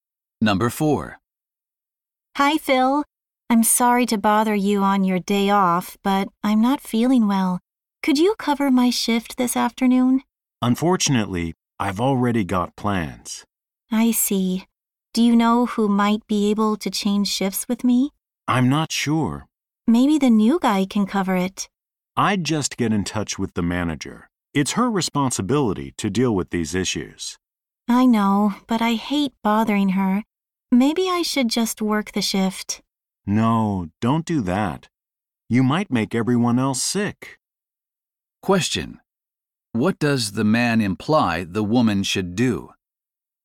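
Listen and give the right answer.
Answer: Contact the manager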